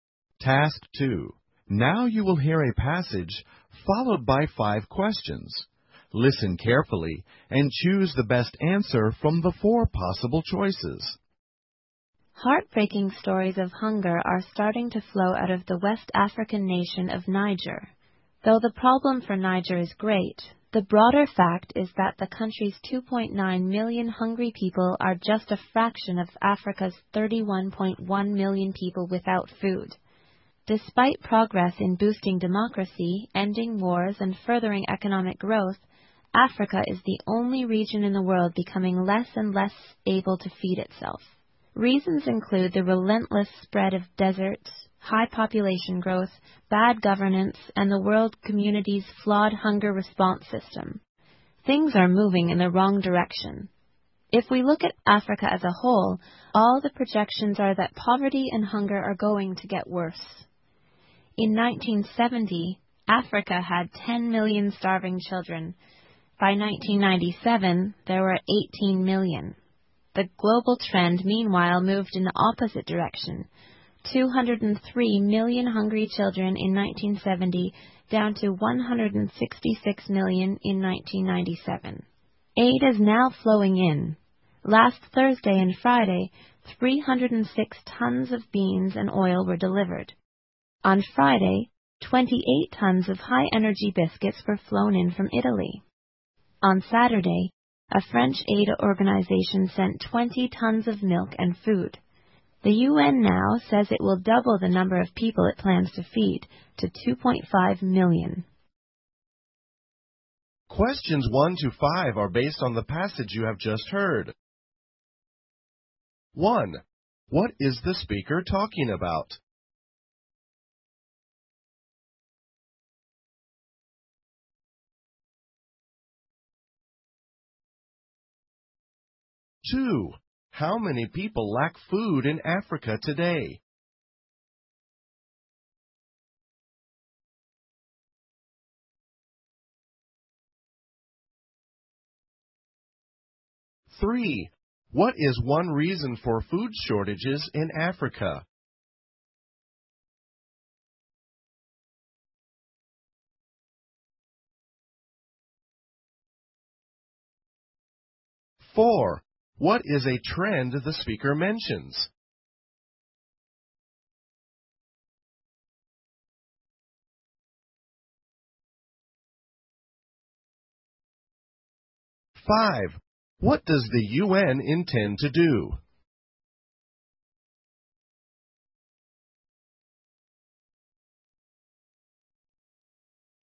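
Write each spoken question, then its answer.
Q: What is the speaker talking about?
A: Hunger in Africa

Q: How many people lack food in Africa today?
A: 31.1 million

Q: What is one reason for food shortages in Africa?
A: The spread of deserts

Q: What does the UN intend to do?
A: Double the number of people it feeds to 2.5 million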